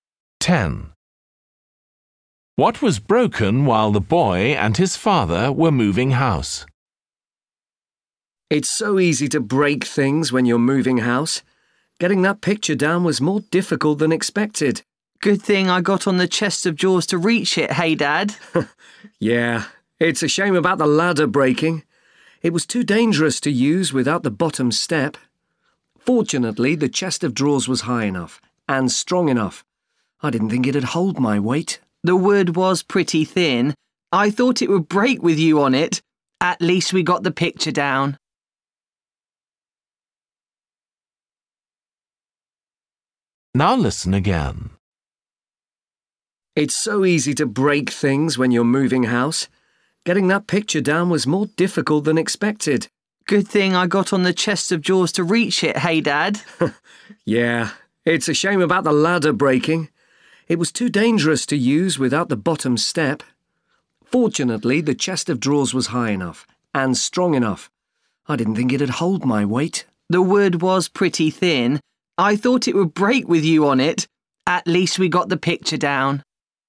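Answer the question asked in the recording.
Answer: the ladder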